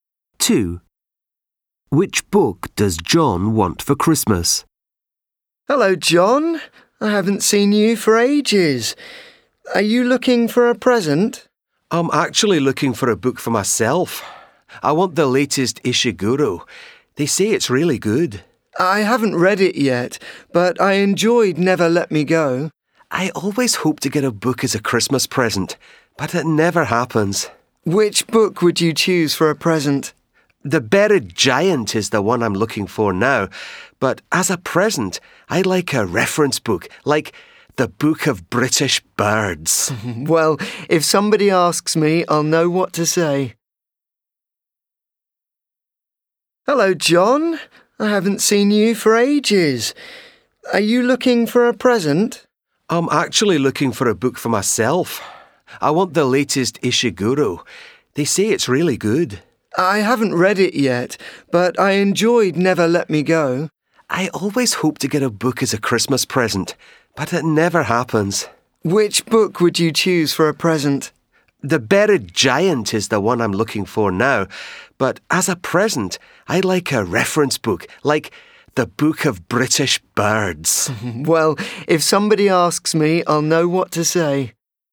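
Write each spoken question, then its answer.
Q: Which book does John want for Christmas?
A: The Book of British Birds (a reference book)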